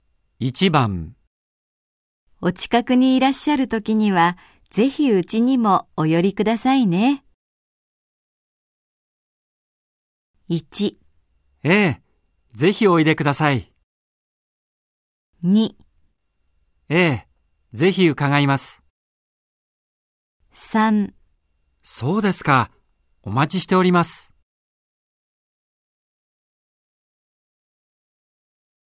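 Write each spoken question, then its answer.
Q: お近くにいらっしゃるときにはぜひうちにもお寄りくださいね。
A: 2: ええ、ぜひ伺います。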